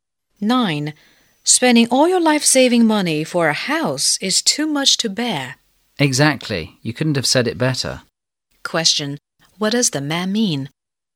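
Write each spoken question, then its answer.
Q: What does the man mean?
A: He fully agrees that spending all your savings on a house is too much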